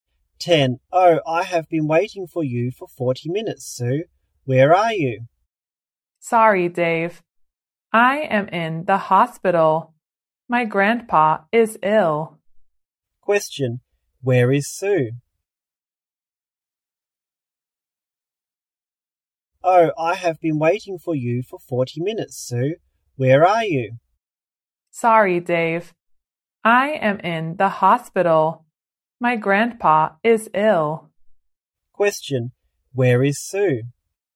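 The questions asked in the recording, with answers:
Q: Where is Sue?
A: In the hospital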